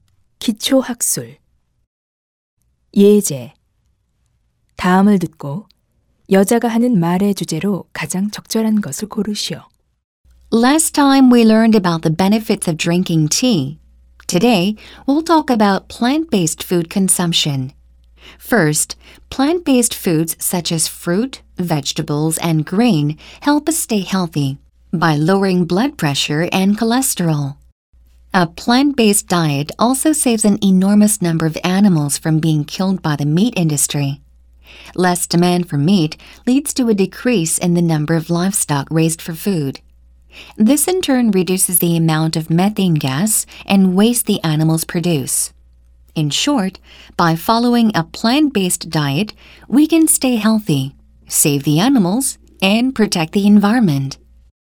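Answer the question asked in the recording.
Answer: 식물성 식단의 이점(건강, 동물 보호, 환경 보호)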